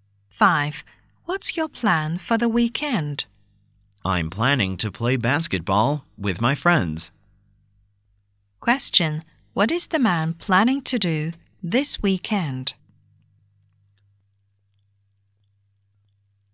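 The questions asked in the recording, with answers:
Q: What is the man planning to do this weekend?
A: Play basketball with his friends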